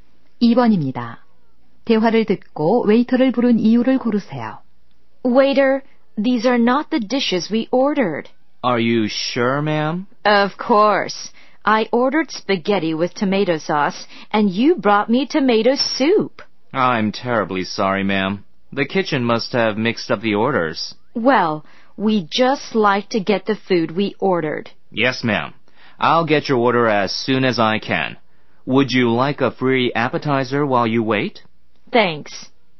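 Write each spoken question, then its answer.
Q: 대화를 듣고 웨이터를 부른 이유를 고르세요.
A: 주문한 음식이 잘못 나와서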